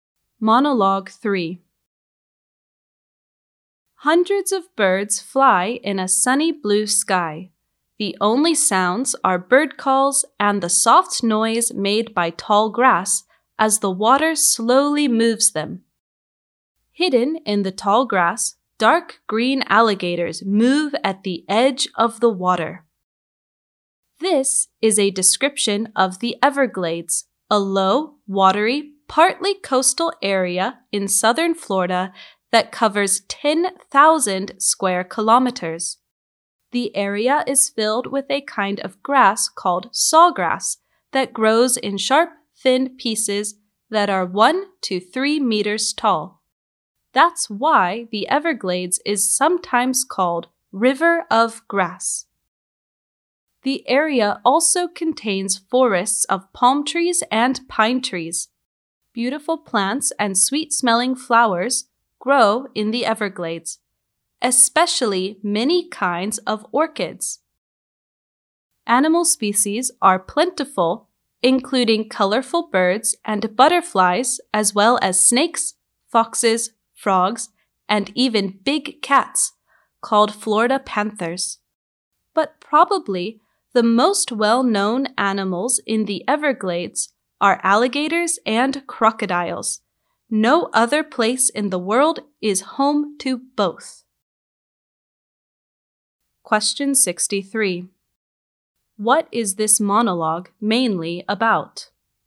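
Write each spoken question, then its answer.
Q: What is this monologue mainly about?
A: The Everglades in southern Florida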